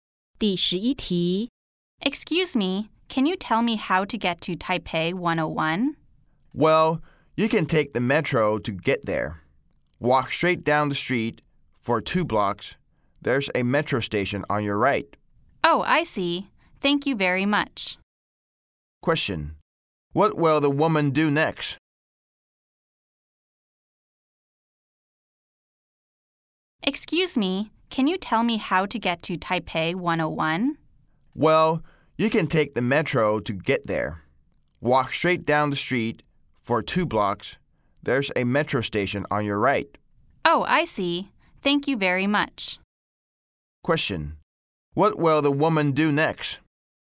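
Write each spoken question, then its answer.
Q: What will the woman do next?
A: Take the metro (walk to the metro station)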